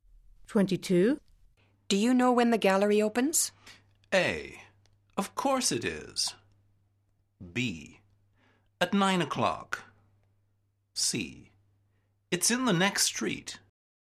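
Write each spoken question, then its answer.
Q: Do you know when the gallery opens?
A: B: At 9 o'clock.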